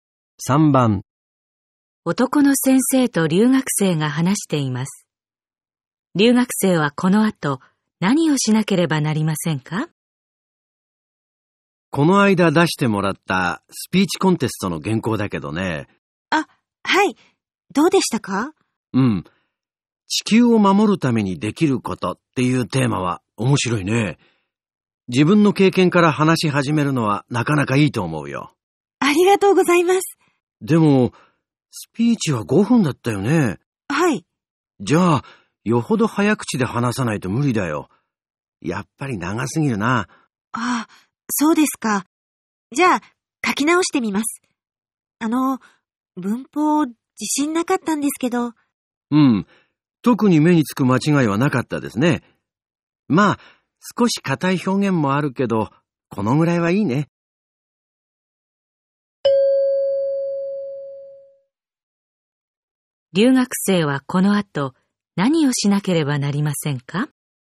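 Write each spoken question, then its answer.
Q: 留学生はこの後何をしなければなりませんか?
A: 原稿を短く書き直す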